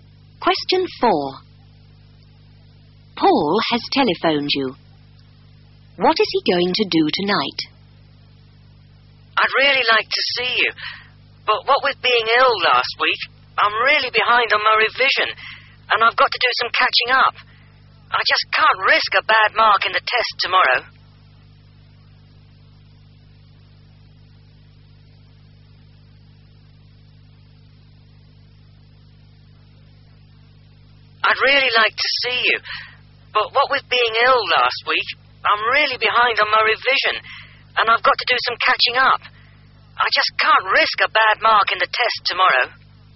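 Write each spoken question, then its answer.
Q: What is he going to do tonight?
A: Catch up on his revision for tomorrow's test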